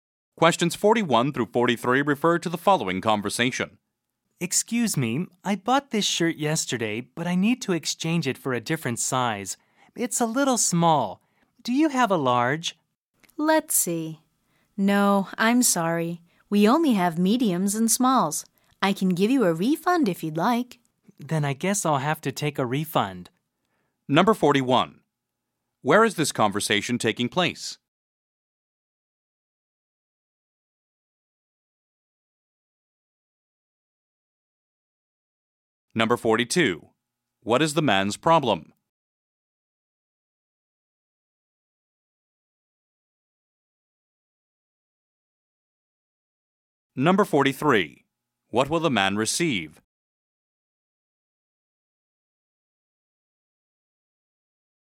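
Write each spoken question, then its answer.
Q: Where is this conversation taking place?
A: In a clothing store

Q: What is the man's problem?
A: His shirt is too small

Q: What will the man receive?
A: A refund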